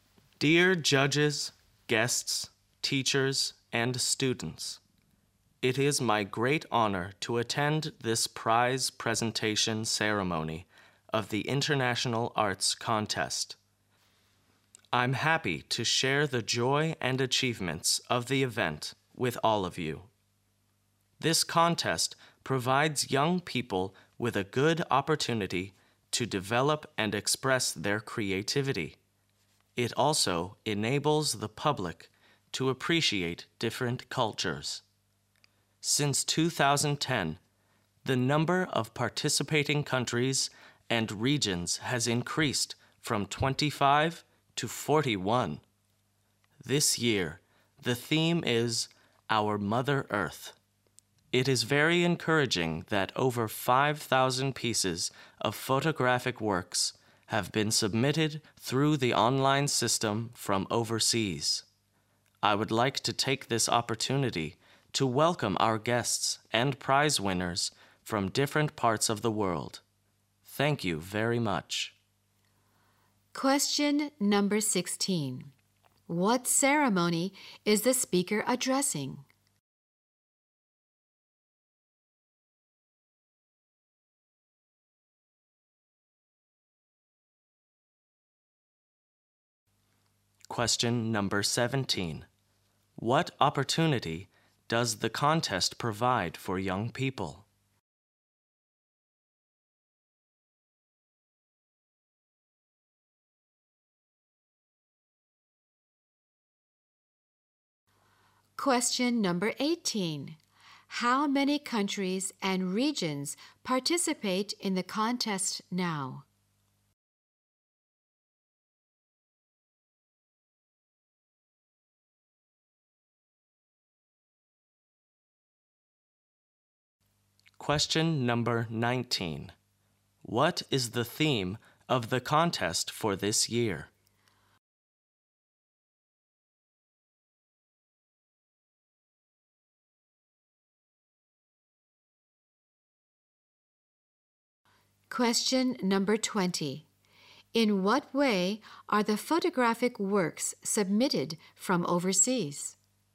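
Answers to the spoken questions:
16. The prize presentation ceremony of the International Arts Contest
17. To develop and express their creativity
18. 41
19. Our Mother Earth
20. Through the online system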